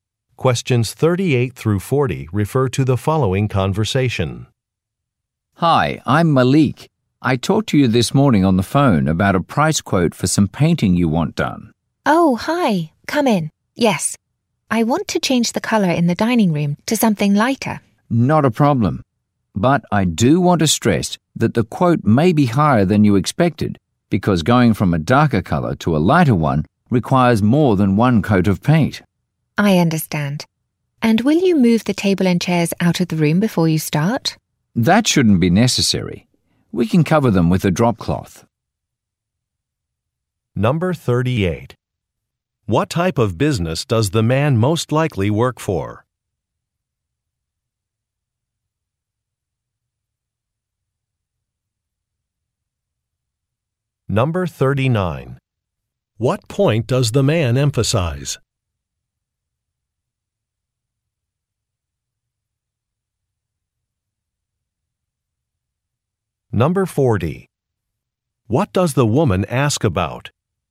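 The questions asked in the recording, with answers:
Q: What type of business does the man most likely work for?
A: A painting company

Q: What point does the man emphasize?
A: The price may be higher than expected

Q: What does the woman ask about?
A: Whether the furniture will be moved out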